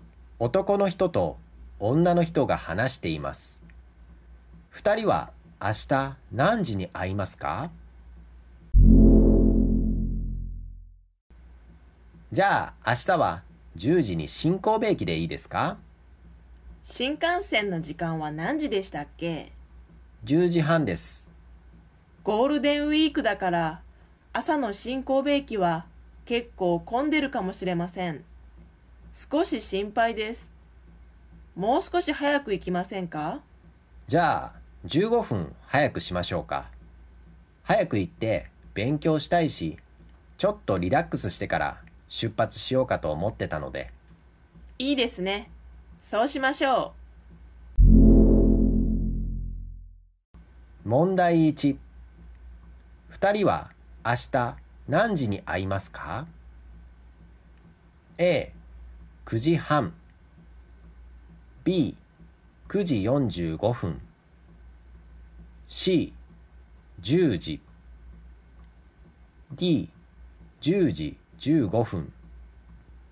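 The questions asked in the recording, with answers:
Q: 二人は明日何時に会いますか?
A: B: 9時45分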